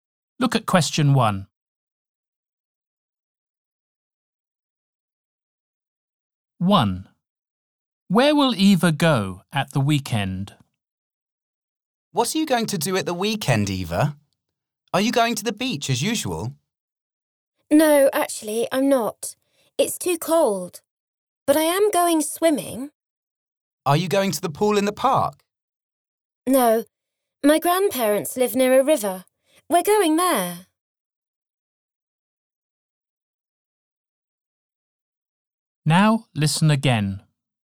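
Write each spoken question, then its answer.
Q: Where will Eva go at the weekend?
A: to a river near her grandparents' home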